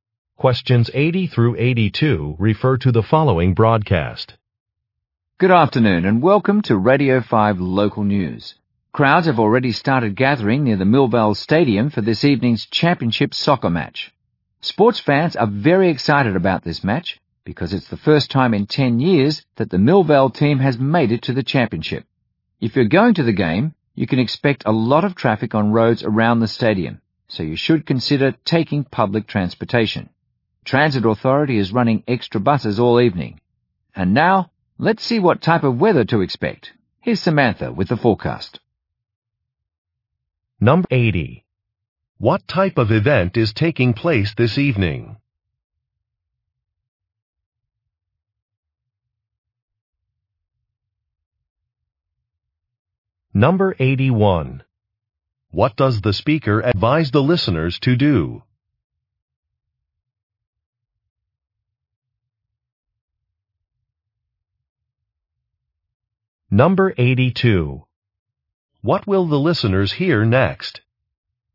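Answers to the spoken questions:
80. A championship soccer match
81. Take public transportation
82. A weather forecast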